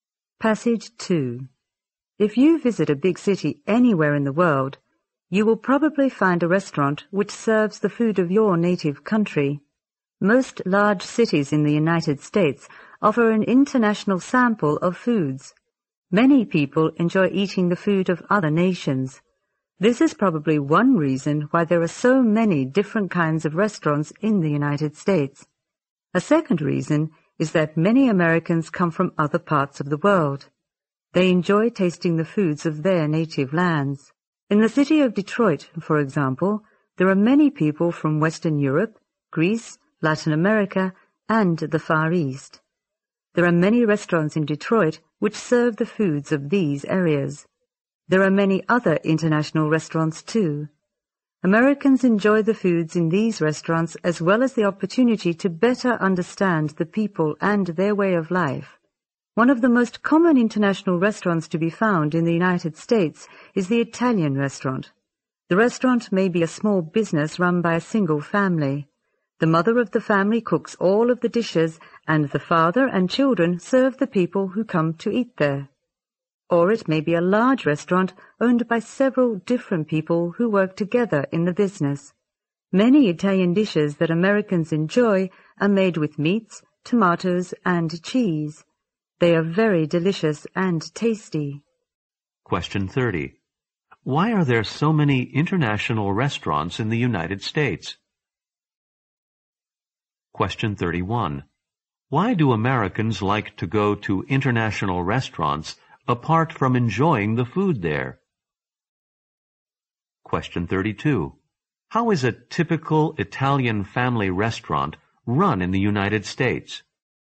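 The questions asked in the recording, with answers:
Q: Why are there so many international restaurants in the United States?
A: People enjoy other nations' food, and many Americans come from other parts of the world.

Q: Why do Americans like to go to international restaurants apart from enjoying the food there?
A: To better understand other peoples and their way of life.

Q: How is a typical Italian family restaurant run in the United States?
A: The mother cooks, and the father and children serve the customers.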